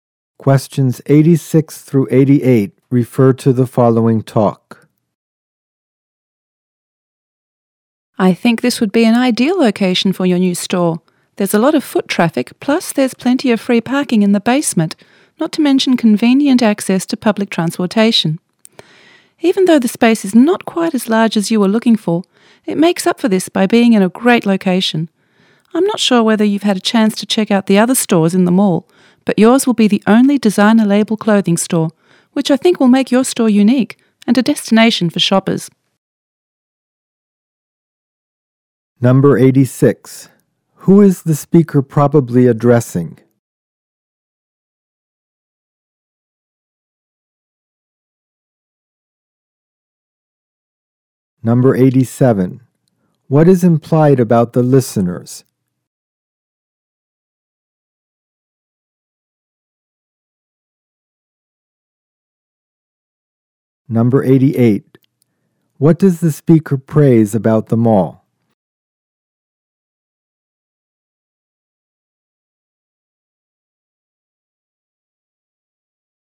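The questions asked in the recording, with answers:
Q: Who is the speaker probably addressing?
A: A store owner looking for a new store location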